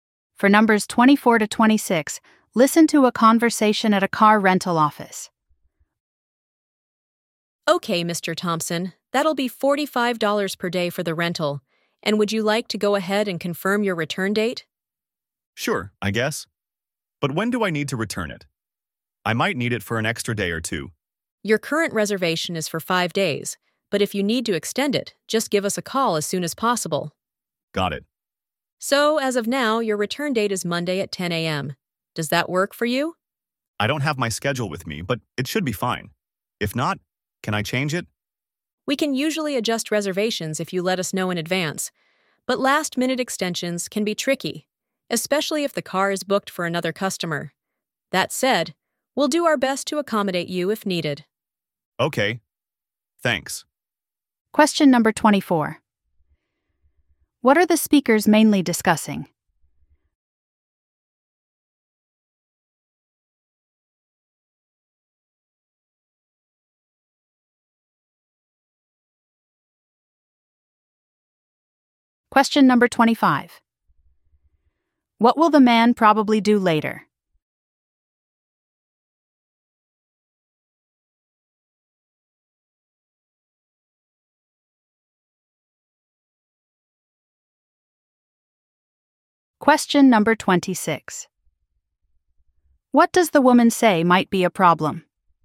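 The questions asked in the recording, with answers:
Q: What are the speakers mainly discussing?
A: The return date of a rental car

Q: What does the woman say might be a problem?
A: Last-minute extensions if the car is booked by another customer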